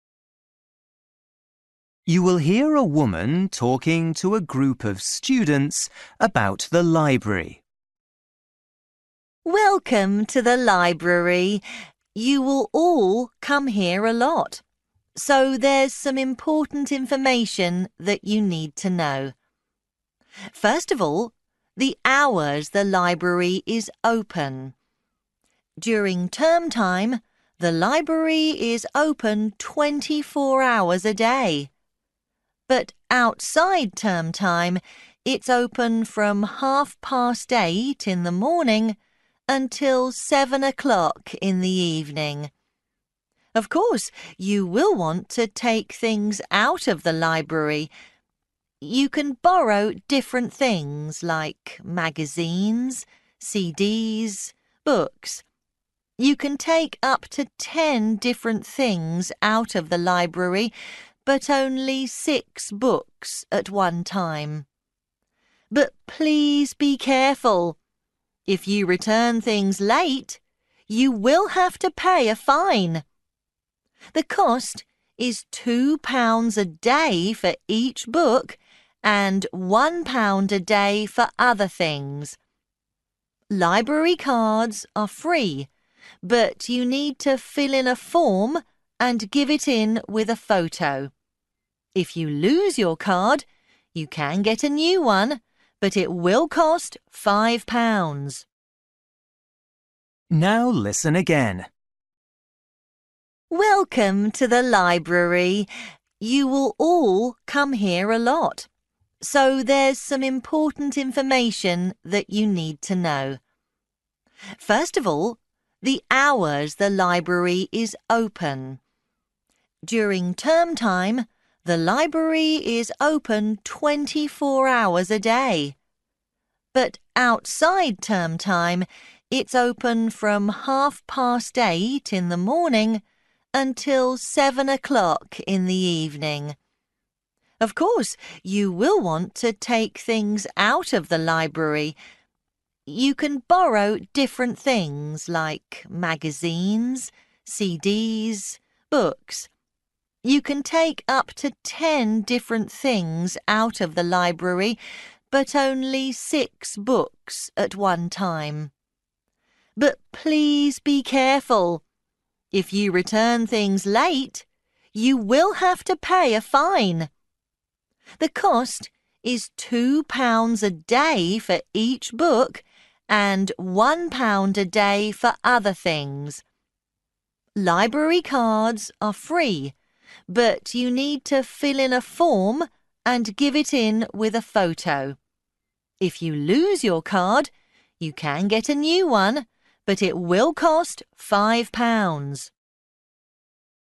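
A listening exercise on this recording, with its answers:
For each question, write the correct answer in the gap. Write one word or a number or a date or a time.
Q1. Hours outside term time: (1) - 7.00 p.m.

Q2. Number of books you can take out: (2)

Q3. Cost of returning CDs and magazines late: (3) £ per day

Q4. Cost of first library card: (4)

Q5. To get a card, give in a form and: (5)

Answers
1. 8.30 a.m.
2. 6
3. 1
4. free
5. photo

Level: Luyện nghe trình độ A2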